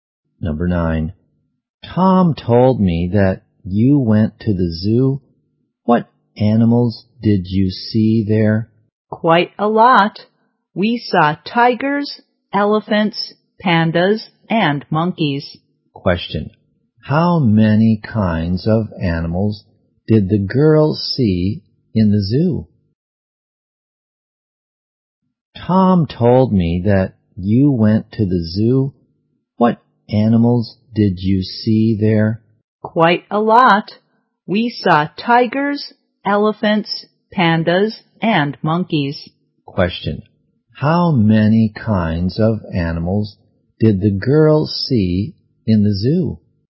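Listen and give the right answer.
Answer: Four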